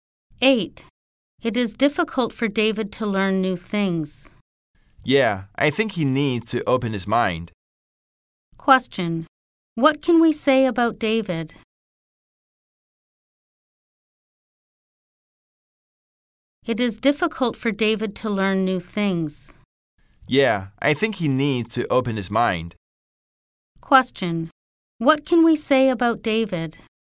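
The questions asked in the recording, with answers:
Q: What can we say about David?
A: He isn't open-minded.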